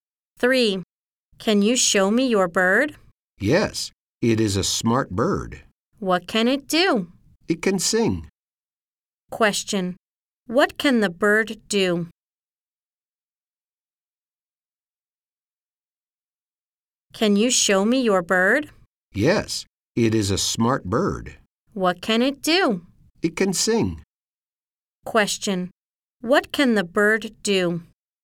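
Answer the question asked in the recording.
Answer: It can sing.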